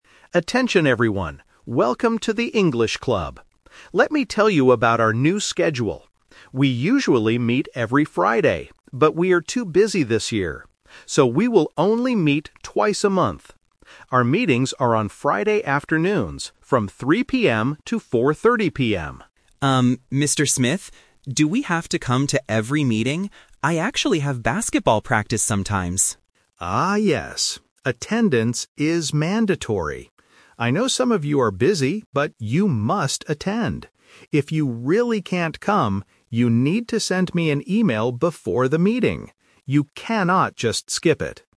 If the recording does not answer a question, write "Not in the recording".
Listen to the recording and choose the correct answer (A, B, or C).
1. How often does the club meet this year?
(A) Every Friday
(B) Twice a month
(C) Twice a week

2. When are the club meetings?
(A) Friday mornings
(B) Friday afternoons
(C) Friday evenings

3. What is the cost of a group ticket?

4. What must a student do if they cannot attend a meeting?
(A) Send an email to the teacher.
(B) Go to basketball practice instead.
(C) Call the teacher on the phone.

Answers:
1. B
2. B
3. Not in the recording
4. A

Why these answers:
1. Mr. Smith says "So, we will only meet twice a month." Option A (Every Friday) is a trap because he mentions "We usually meet every Friday," but that is the old schedule, not this year's schedule. Option C is not mentioned.
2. Mr. Smith clearly states, "Our meetings are on Friday afternoons." Options A and C are plausible but not mentioned in the audio.
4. Mr. Smith says, "If you really can't come, you need to send me an email before the meeting." Option B is a trap because Leo mentions basketball practice as his personal reason, but it is not the rule for everyone. Option C is not mentioned (they must email, not call).

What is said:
Mr. Smith: Attention everyone! Welcome to the English Club. Let me tell you about our new schedule. We usually meet every Friday, but we are too busy this year. So, we will only meet twice a month. Our meetings are on Friday afternoons, from 3:00 PM to 4:30 PM.
Smith? Do we have to come to every meeting? I actually have basketball practice sometimes.
Mr. Smith: Ah, yes. Attendance is mandatory. I know some of you are busy, but you must attend. If you really can't come, you need to send me an email before the meeting. You cannot just skip it.

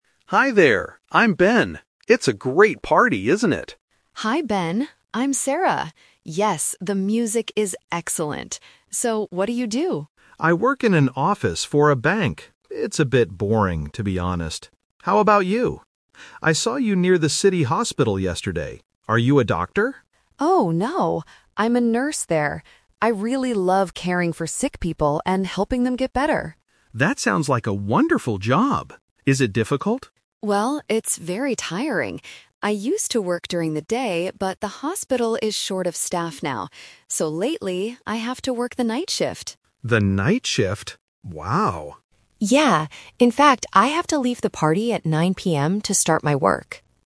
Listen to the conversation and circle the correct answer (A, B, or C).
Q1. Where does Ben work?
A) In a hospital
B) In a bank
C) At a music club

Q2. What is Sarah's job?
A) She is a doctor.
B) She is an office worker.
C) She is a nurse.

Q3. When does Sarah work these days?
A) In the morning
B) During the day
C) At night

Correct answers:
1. B
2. C
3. C

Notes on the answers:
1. Ben says, "I work in an office for a bank." Option (A) is a trap because he mentions the hospital where he saw Sarah. Option (C) is a trap because Sarah mentions the "music" at the party.
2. Ben asks if she is a doctor (Trap), but Sarah corrects him: "Oh, no. I'm a nurse there." Option (B) is Ben's job.
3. Sarah mentions she "used to work during the day" (Trap), but because the hospital is short of staff, she says "lately, I have to work the night shift." She also has to leave the party at 9 PM to go to work.

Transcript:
Ben: Hi there! I'm Ben. It's a great party, isn't it?
Sarah: Hi Ben, I'm Sarah. Yes, the music is excellent! So, what do you do?
Ben: I work in an office for a bank. It's a bit boring, to be honest. How about you? I saw you near the City Hospital yesterday. Are you a doctor?
Sarah: Oh, no. I'm a nurse there. I really love caring for sick people and helping them get better.
Ben: That sounds like a wonderful job. Is it difficult?
Sarah: Well, it's very tiring. I used to work during the day, but the hospital is short of staff now. So lately, I have to work the night shift.
Ben: The night shift? Wow.
Sarah: Yeah. In fact, I have to leave the party at 9 PM to start my work!

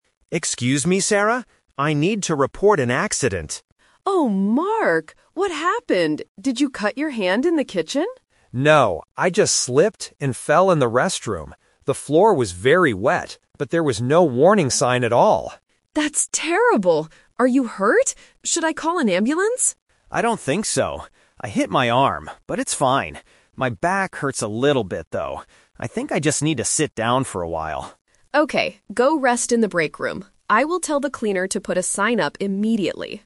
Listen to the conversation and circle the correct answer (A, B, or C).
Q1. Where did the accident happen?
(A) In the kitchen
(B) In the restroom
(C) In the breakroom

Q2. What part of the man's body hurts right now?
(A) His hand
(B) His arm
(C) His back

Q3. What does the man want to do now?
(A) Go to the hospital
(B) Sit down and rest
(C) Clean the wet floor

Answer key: 1B, 2C, 3B

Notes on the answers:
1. Mark clearly states, "I just slipped and fell in the restroom." Option (A) is a trap because the manager asks if he had an accident in the kitchen, but he says "No". Option (C) is where he will go to rest after the accident.
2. This question uses "The Twist". The manager mentions his hand (Option A - Trap). Mark says he hit his arm (Option B - Trap), but then adds, "but it's fine." Finally, he confirms, "My back hurts a little bit."
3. Mark says, "I think I just need to sit down for a while," and Sarah tells him to go rest. Option (A) is a trap because Sarah asks if she should call an ambulance, but Mark rejects the idea ("I don't think so"). Option (C) is wrong because the cleaner will do it, not Mark.

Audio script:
Mark (Employee): Excuse me, Sarah? I need to report an accident.
Sarah (Manager): Oh, Mark! What happened? Did you cut your hand in the kitchen?
Mark: No. I just slipped and fell in the restroom. The floor was very wet, but there was no warning sign at all.
Sarah: That's terrible! Are you hurt? Should I call an ambulance?
Mark: I don't think so. I hit my arm, but it's fine. My back hurts a little bit, though. I think I just need to sit down for a while.

